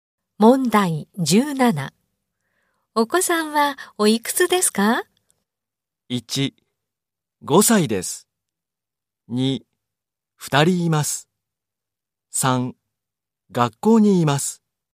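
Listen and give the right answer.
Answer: 1: 5歳です。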